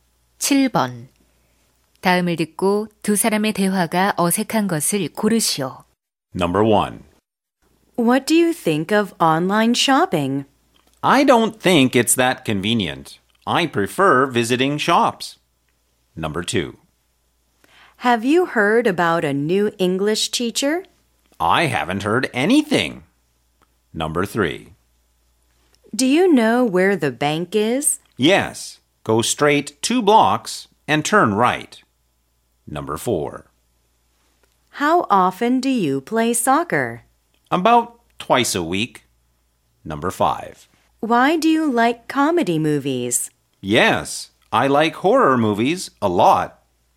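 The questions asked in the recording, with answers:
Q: 다음을 듣고 두 사람의 대화가 어색한 것을 고르시오.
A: 5: Why do you like comedy movies? / Yes, I like horror movies a lot.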